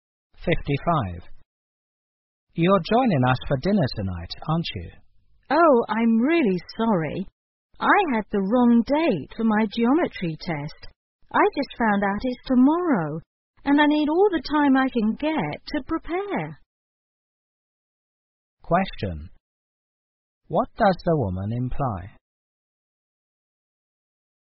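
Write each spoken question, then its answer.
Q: What does the woman imply?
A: She can't join them for dinner because she must study for her test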